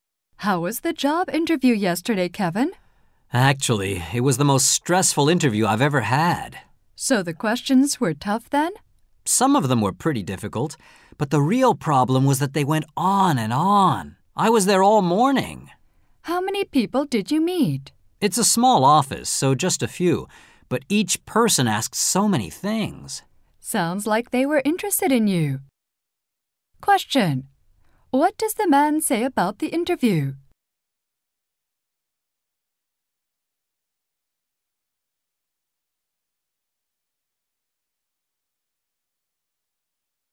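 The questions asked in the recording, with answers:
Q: What does the man say about the interview?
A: It was very stressful because it went on so long (all morning).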